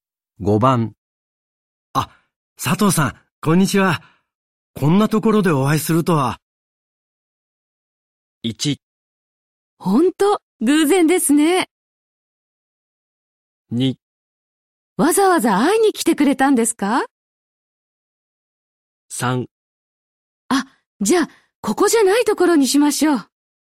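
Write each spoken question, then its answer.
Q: あ、佐藤さん、こんにちは。こんなところでお会いするとは。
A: 1: 本当、偶然ですね。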